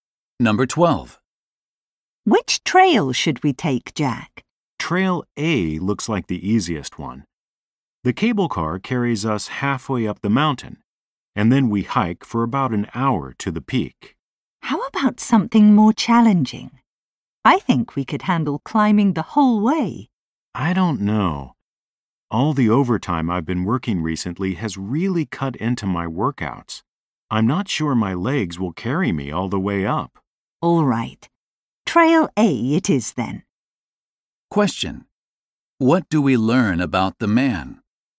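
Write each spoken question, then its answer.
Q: What do we learn about the man?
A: He hasn't been working out much because of overtime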